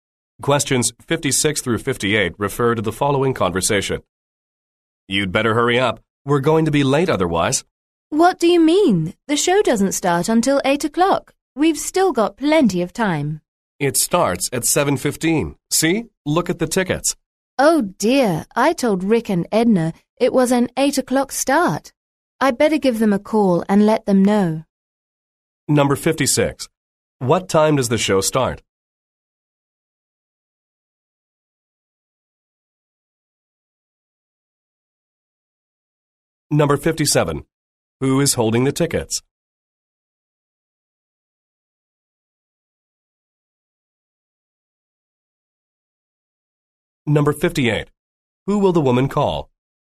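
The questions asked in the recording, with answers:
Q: What time does the show start?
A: 7:15

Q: Who will the woman call?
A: Rick and Edna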